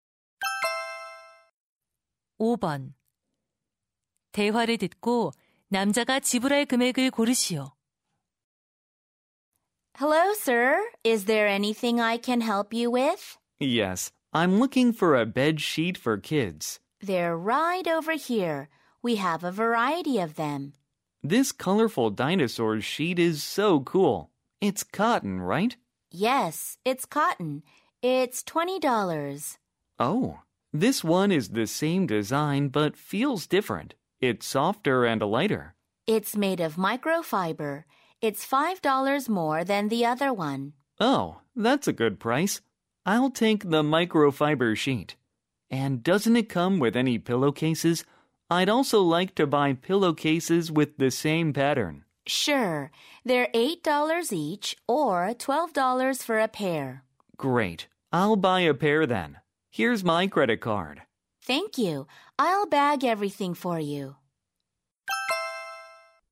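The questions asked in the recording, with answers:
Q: 대화를 듣고 남자가 지불할 금액을 고르시오.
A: $37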